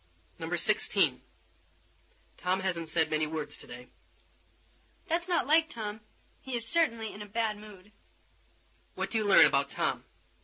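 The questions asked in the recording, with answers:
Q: What do you learn about Tom?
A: He doesn't usually stay quiet, so he must be in a bad mood.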